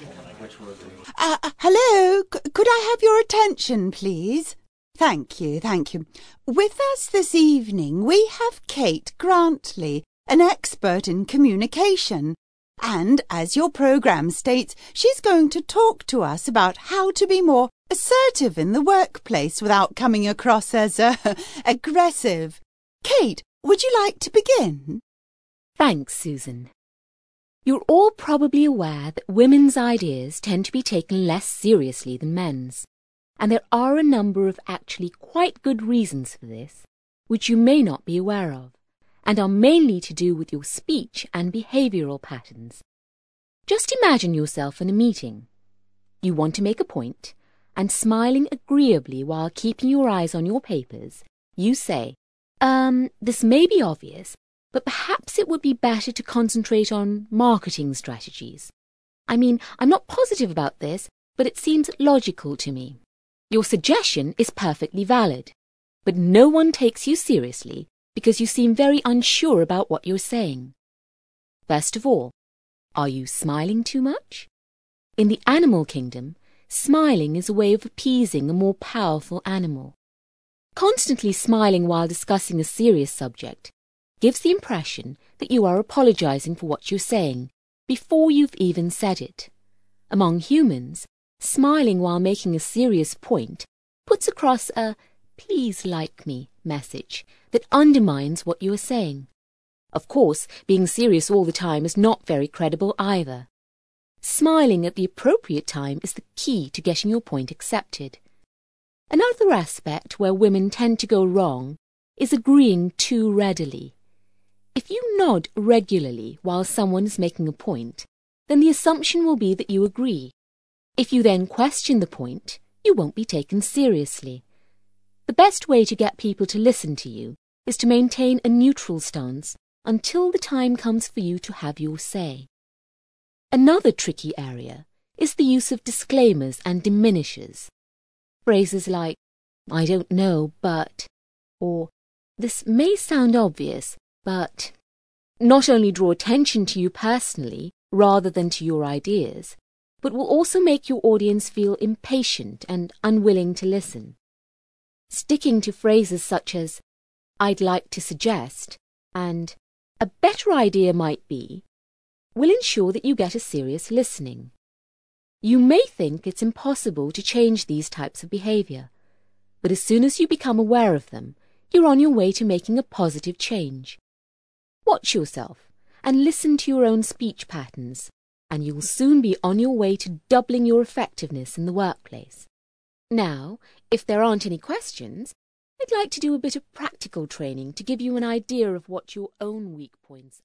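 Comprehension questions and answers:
ACTIVITY 14: You will hear part of a talk on behaviour in the workplace. After listening, for questions 9-17 complete the blank spaces in the sentences below with a word or short phrase. Then check the audio transcription and the correct answers.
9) The presenter suggests that people sometimes may appear when they only want to be assertive.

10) Kate claims that views put forward by women are often not considered as as those of their male colleagues.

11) Women's lack of assurance is often revealed through how they speak and their .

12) Weaker animals use smiling as a way of an adversary.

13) For humans, when discussing a serious subject you should not smile, as this your point.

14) It is generally assumed that you are in agreement with somebody if you as they speak.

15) If you want people to listen to you, you should adopt a .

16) Peppering your speech with disclaimers and diminishers only serves to make others and to pay attention.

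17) By changing your way of speaking and behaving you will be able to increase your at work.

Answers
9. aggressive
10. seriously
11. behaviour
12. appeasing
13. undermines
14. nod regularly
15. neutral stance
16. impatient; unwilling
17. effectiveness

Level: CPE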